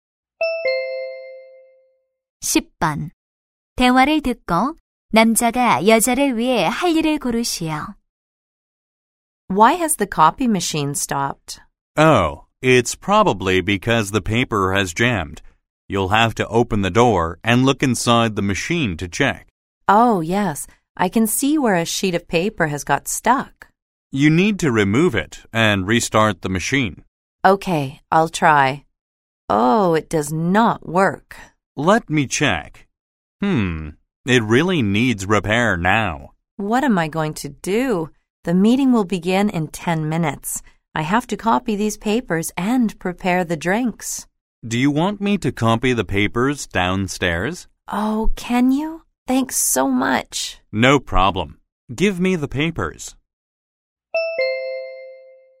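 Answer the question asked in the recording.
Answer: 아래층에서 서류 복사하기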